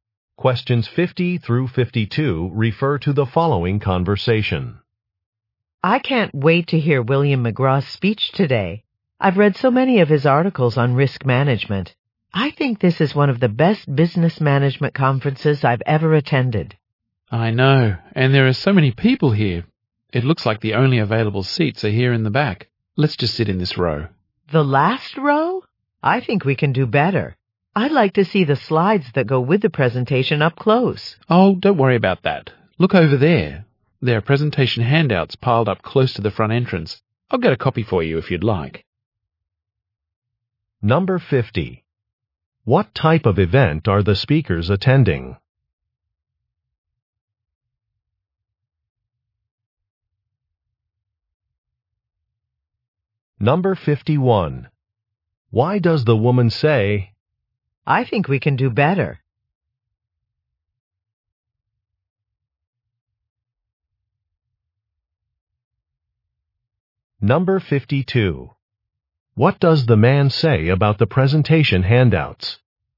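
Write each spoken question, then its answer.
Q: What type of event are the speakers attending?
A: A business management conference

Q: Why does the woman say,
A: She wants to sit closer to see the slides

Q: What does the man say about the presentation handouts?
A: They are near the front entrance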